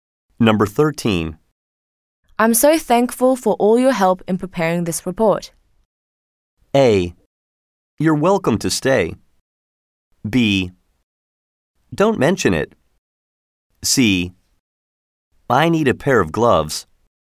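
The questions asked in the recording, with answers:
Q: I'm so thankful for all your help in preparing this report.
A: B: Don't mention it.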